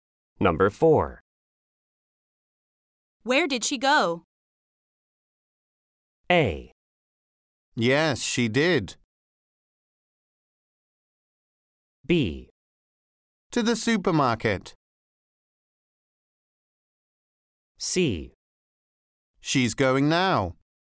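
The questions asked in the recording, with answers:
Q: Where did she go?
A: B: To the supermarket.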